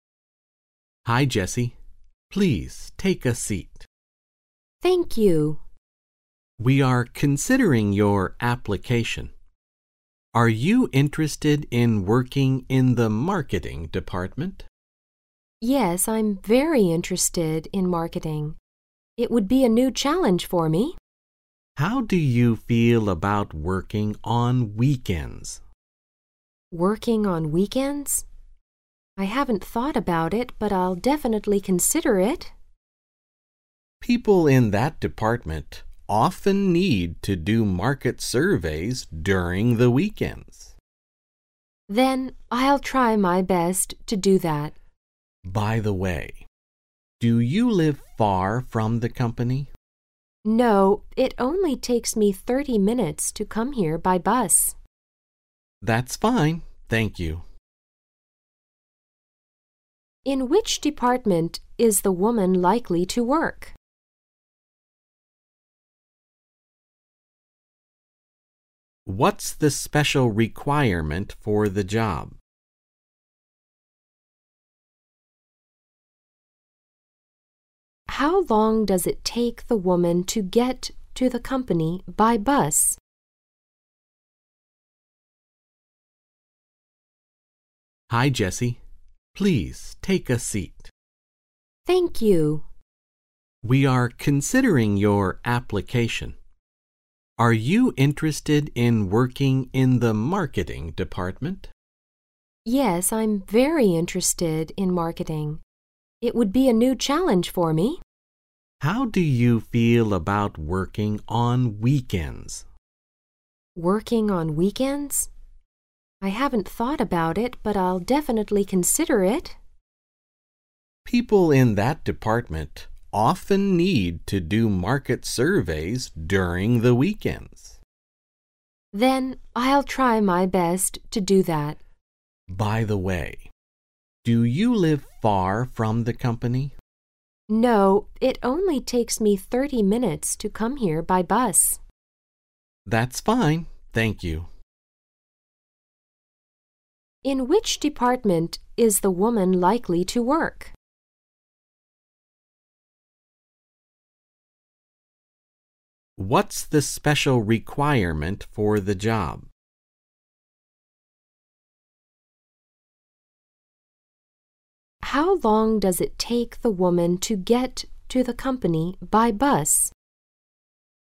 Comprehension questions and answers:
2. What's the special requirement for the job?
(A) Taking a long business trip.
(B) Working on weekends.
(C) Having work experience.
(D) Living in the company's dormitory.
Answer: Working on weekends.

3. How long does it take the woman to get to the company by bus?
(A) Half an hour.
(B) One hour.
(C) One hour and a half.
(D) Two hours.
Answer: Half an hour.

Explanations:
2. 本题问的是"这份工作有什么特殊要求"(What's the special requirement for the job),对话中男士说:"How do you feel about working on weekends"(你对周末工作怎么看);"People in that department often need to do market surveys during the weekends"(这个部门需要员工在周末做市场调查)。因此选B。

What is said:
Please take a seat. W: Thank you. M: We are considering your application. Are you interested in working in the Marketing Department? W: Yes, I'm very interested in marketing. It would be a new challenge for me. M: How do you feel about working on weekends? W: Working on weekends? I haven't thought about it, but I'll definitely consider it. M: People in that department often need to do market surveys during the weekends. W: Then I'll try my best to do that. M: By the way, do you live far from the company? W: No, it only takes me 30 minutes to come here by bus. M: That's fine. Thank you.
In which department is the woman likely to work?

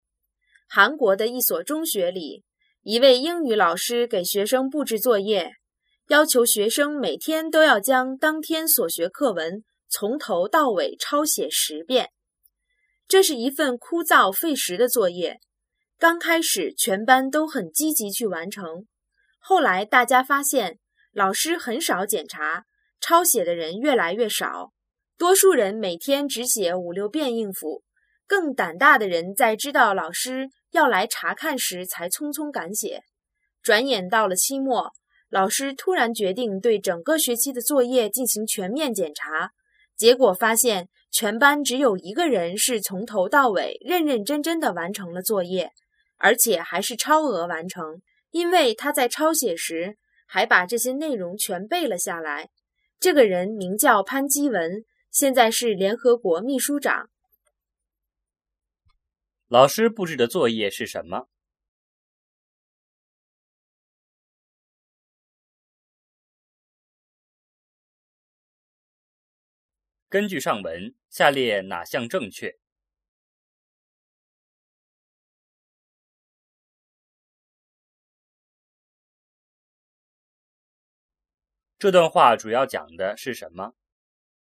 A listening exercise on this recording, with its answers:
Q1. 老师布置的作业是什么?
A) 抄写生词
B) 抄写英语课文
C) 抄写韩语课文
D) 抄写汉语课文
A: 抄写英语课文

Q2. 根据上文,下列哪项正确?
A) 写作业很有意思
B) 大家都积极完成作业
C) 老师从来不检查作业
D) 只有一个人完成了所有的作业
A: 只有一个人完成了所有的作业

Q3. 这段话主要讲的是什么?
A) 成功是偶然的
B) 学习的重要性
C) 如何教育学生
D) 成功需要坚持不懈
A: 成功需要坚持不懈

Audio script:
韩国的一所中学里,一位英语老师给学生布置作业:要求学生每天都要将当天所学课文从头到尾抄写十遍。这是一份枯燥费时的作业。刚开始全班都很积极去完成,后来大家发现,老师很少检查,抄写的人越来越少。多数人每天只写五六遍应付,更胆大的人在知道老师要来查看时才匆匆赶写。转眼到了期末,老师突然决定对整个学期的作业进行全面检查,结果发现全班只有一个人是从头到尾、认认真真地完成了作业,而且还是超额完成,因为他在抄写时,还把这些内容全背了下来!这个人名叫潘基文,现在是联合国秘书长。

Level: 汉语水平考试(HSK)五级

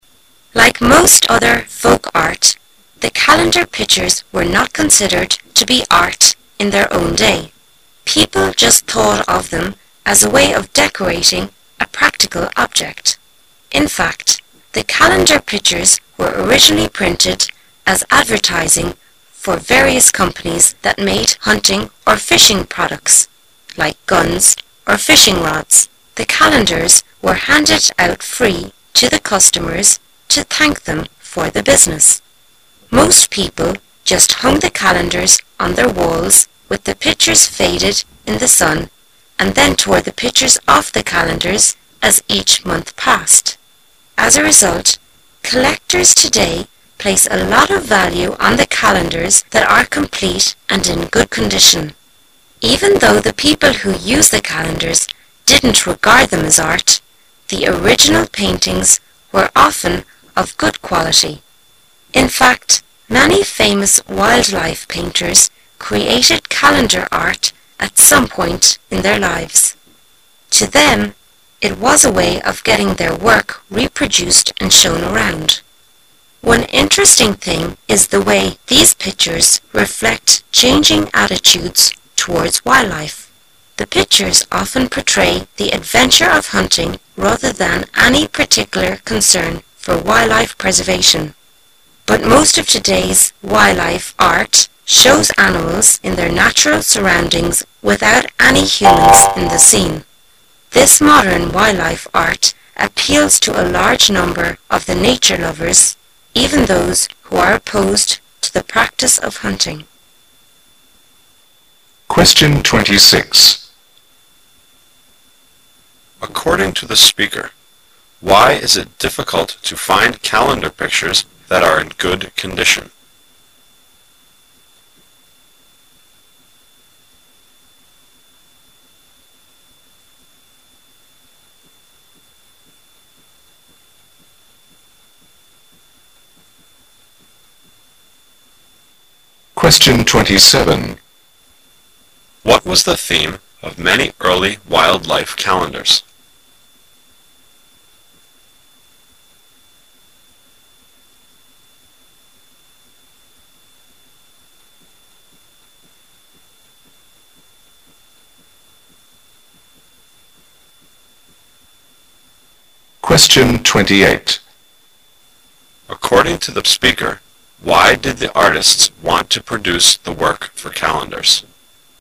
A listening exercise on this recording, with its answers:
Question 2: What was the theme of many early wild life calendars?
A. The excitement of hunting.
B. The beauty of nature.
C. The relaxation of fishing.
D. The protection of endangered species.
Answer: The excitement of hunting.

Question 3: According to the speaker, why did the artists want to produce the work for calendars?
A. To let many people see their works.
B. To earn money from the sale of calendars.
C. To portray the cruelty of hunting.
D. To create gifts for people who bought them.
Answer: To let many people see their works.

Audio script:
[解析] 26-28 Like most other folk art, the calendar pictures were not considered to be art in their own day. People just thought of them as a way of decorating a practical object. In fact, the calendar pictures were originally printed as advertising for various companies that made hunting or fishing products, like guns or fishing rods. The calendars were handed out free to the customers to thank them for the business. Most people just hung the calendars on their walls with the pictures faded in the sun and then tore the pictures off the calendar as each month passed. As a result, collectors today place a lot of value on the calendars that are complete and in good condition. Even though the people who used the calendars didn't regard them as art, the original paintings were often of good quality. In fact, many famous wild life painters created calendar art at some point in their lives. To them it was a way of getting their work reproduced and shown around. One interesting thing is the way these pictures reflect changing attitudes towards wild life. The pictures often portray the adventure of hunting rather than any particular concern for wild life preservation, But most of today's wild life art shows animals in their natural surroundings without any humans in the scene. This modern wild life art appeals to a large number of the nature lovers, even those who are opposed to the practice of hunting. According to the speaker, why is it difficult to find calendar pictures that are in good condition?

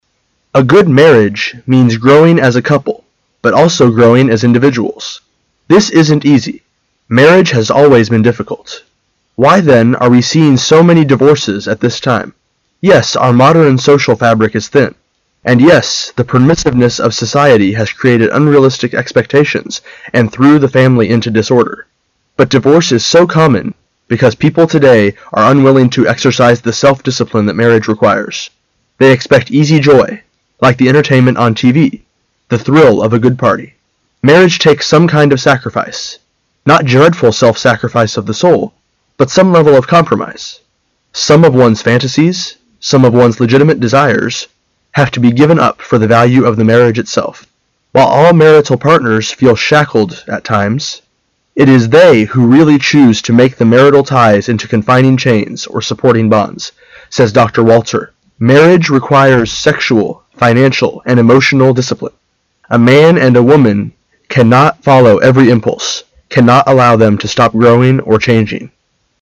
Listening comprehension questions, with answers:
Questions 15 to 17 are based on the following passage. At the end of the passage ,you will be given 15 seconds to answer the questions. Now listen to the passage.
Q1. Which of the following cannot be sacrificed in a marriage?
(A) The freedom to have other sexual relations.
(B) The desire to follow every of one's impulse.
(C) The will to keep his or her own income.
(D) The wish to be his or her true self.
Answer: The wish to be his or her true self.

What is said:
[解析] 15-17 A good marriage means growing as a couple but also growing as individuals. This isn't easy; marriage has always been difficult. Why then are we seeing so many divorces at this time? Yes, our modem social fabric is thin, and yes, the permissiveness of society has created unrealistic expectations and threw the family into disorder. But divorce is so common because people today are unwilling to exercise the self- discipline that marriage requires. They expect easy joy, like the entertainment on TV, the thrill of a good party. Marriage takes some kind of sacrifice, not dreadful self-sacrifice of the soul, but some level of compromise. Some of one's fantasies, some of one's legitimate desires, have to be given up for the value of the marriage itself. "While all martial partners feel shacked at times, it is they who really choose to make the martial ties into confining chains or supporting bonds," says Dr. Walter. Marriage requires sexual, financial and emotional disciple. A man and a woman cannot follow every impulse, cannot allow them to stop growing or changing.

